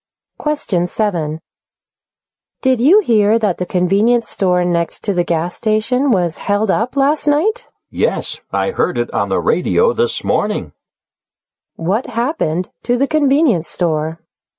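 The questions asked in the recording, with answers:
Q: What happened to the convenience store?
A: It was robbed last night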